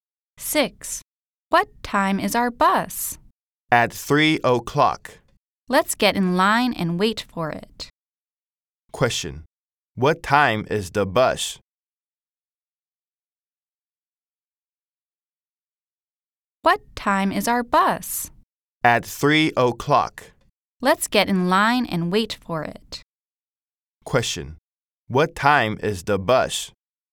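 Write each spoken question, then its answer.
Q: Question. What time is the bus?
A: 3 o'clock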